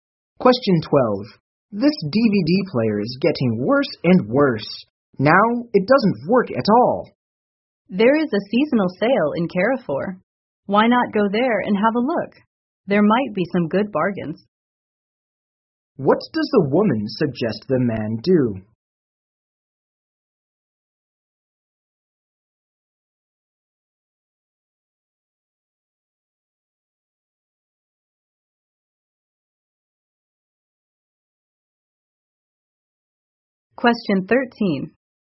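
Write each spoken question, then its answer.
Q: What does the woman suggest the man do?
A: Go to the seasonal sale at Carrefour to look for a new DVD player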